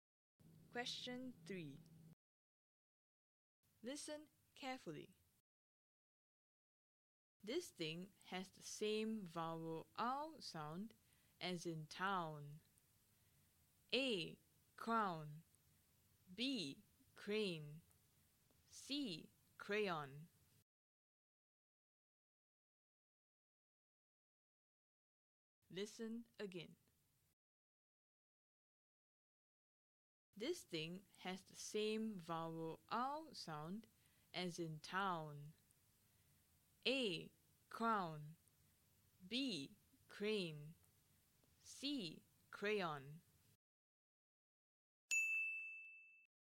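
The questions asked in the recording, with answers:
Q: This thing has the same vowel ow sound as in town.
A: A: Crown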